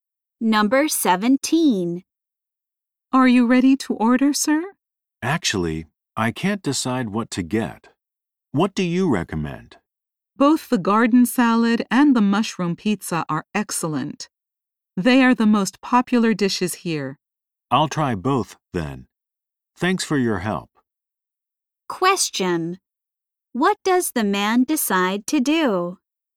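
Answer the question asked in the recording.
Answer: Order both the garden salad and the mushroom pizza.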